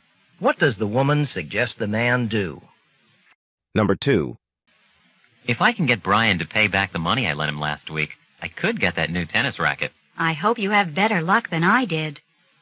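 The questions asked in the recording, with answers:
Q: What does the woman imply?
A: Brian did not pay her back money he borrowed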